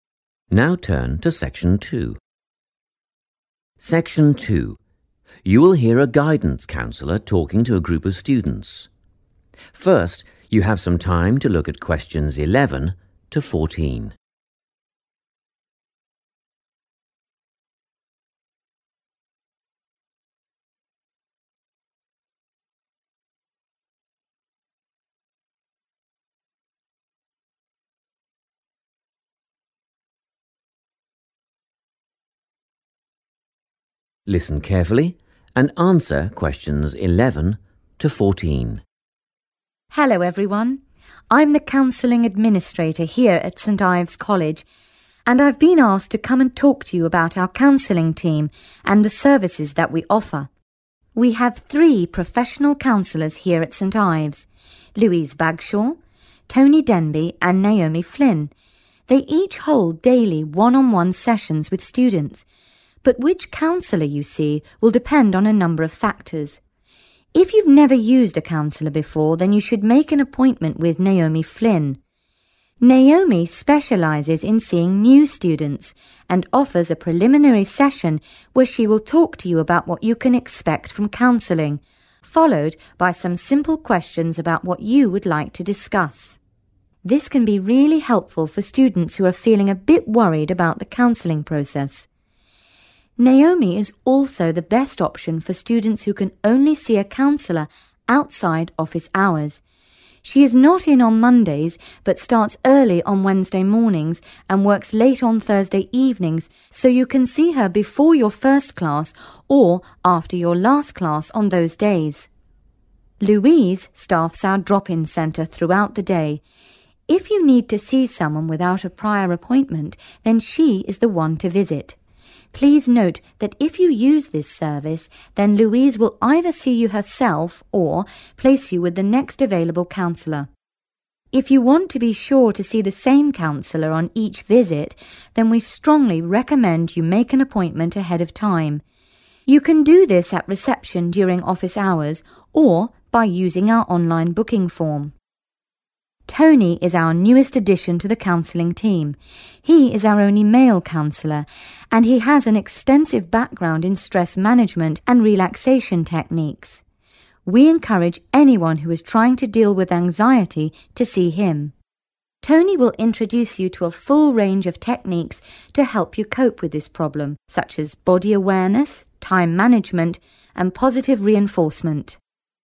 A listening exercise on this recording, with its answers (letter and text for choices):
Write the correct letter, A, B or C, next to questions 11–14.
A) Louise Bagshaw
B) Tony Denby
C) Naomi Flynn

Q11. if you do not have an appointment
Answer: A) Louise Bagshaw

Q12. if it is your first time seeing a counsellor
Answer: C) Naomi Flynn

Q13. if your concerns are related to anxiety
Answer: B) Tony Denby

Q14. if you are unable to see a counsellor during normal office hours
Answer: C) Naomi Flynn

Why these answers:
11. The correct answer is A because the speaker explains that Louise Bagshaw works at the 'drop-in centre.' A 'drop-in' service means you can go there without calling first or making a plan in advance. The text clearly states that if you want to see a counsellor but do not have a pre-existing appointment, she is the person you should go to.
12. The correct answer is C because the speaker specifically mentions that students who have never visited a counsellor before should meet with Naomi Flynn. She is an expert in helping students who are new to the process. In the transcript, the phrase 'never used a counsellor before' is a synonym for 'your first time'.
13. The correct answer is B because Tony Denby is the counselor who specializes in helping students handle stress and stay calm. The guide specifically mentions that if a student is struggling with anxiety, they are encouraged to visit Tony.
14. The correct answer is Naomi Flynn (C) because she offers special appointment times for students who are busy during normal work hours. The counselor explains that Naomi is the 'best option' for these students since she starts work early on Wednesday mornings and stays late on Thursday evenings. This allows students to have a session before their first class or after their last class.

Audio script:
Section 2
You will hear a guidance counsellor talking to a group of students. First you have some time to look at questions 11 to 14.
Listen carefully and answer questions 11 to 14.
Hello everyone. I'm the counselling administrator here at St. Ive's College and I've been asked to come and talk to you about our counselling team and the services that we offer.
We have three professional counsellors here at St. Ives: Louise Bagshaw, Tony Denby and Naomi Flynn. They each hold daily one-on-one sessions with students, but which counsellor you see will depend on a number of factors.
If you've never used a counsellor before, then you should make an appointment with Naomi Flynn. Naomi specialises in seeing new students and offers a preliminary session where she will talk to you about what you can expect from counselling, followed by some simple questions about what you would like to discuss. This can be really helpful for students who are feeling a bit worried about the counselling process. Naomi is also the best option for students who can only see a counsellor outside office hours. She is not in on Mondays, but starts early on Wednesday mornings and works late on Thursday evenings, so you can see her before your first class or after your last class on those days.
Louise staffs our drop-in centre throughout the day. If you need to see someone without a prior appointment then she is the one to visit. Please note that if you use this service then Louise will either see you herself, or place you with the next available counsellor. If you want to be sure to see the same counsellor on each visit, then we strongly recommend you make an appointment ahead of time. You can do this at reception during office hours or by using our online booking form.
Tony is our newest addition to the counselling team. He is our only male counsellor and he has an extensive background in stress management and relaxation techniques. We encourage anyone who is trying to deal with anxiety to see him. Tony will introduce you to a full range of techniques to help you cope with this problem such as body awareness, time management and positive reinforcement.
Before you hear the rest of the talk, you have some time to look at questions 15 to 20.
Now listen and answer questions 15 to 20.